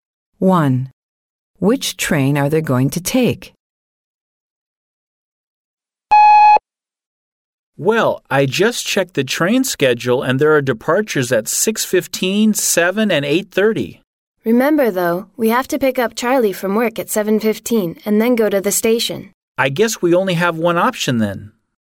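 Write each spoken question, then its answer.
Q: Which train are they going to take?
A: The 8:30 train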